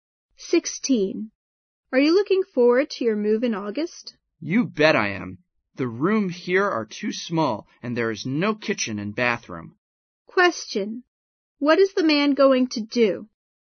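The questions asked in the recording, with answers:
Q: What is the man going to do?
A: Move in August to a bigger place with a kitchen and bathroom.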